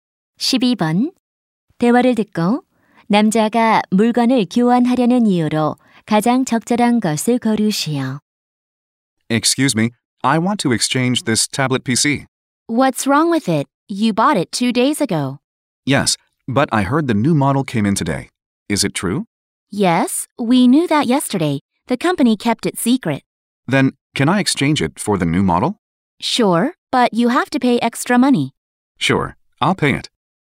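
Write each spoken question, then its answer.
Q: 대화를 듣고 남자가 물건을 교환하려는 이유로 가장 적절한 것을 고르시오.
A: 새 모델이 나와서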